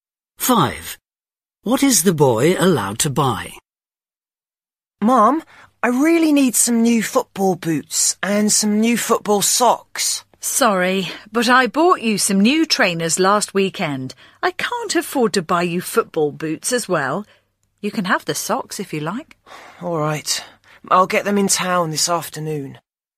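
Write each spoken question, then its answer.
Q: What is the boy allowed to buy?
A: football socks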